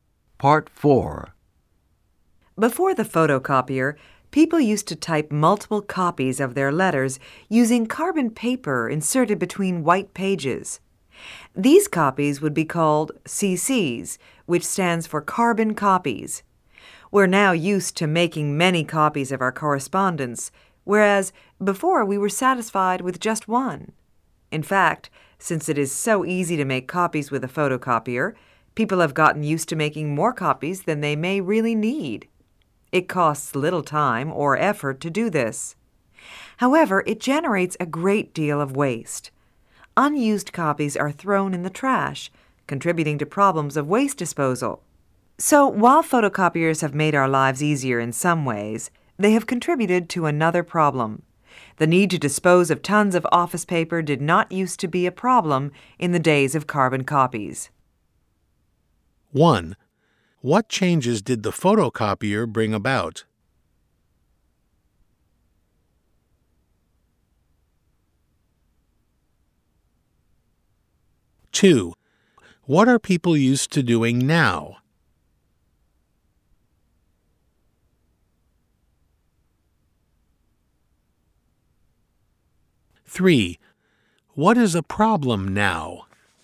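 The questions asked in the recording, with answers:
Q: What changes did the photocopier bring about?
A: People make many more copies, creating paper waste.

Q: What are people used to doing now?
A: Making many copies of their correspondence.

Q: What is a problem now?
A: Disposing of waste paper from unused copies.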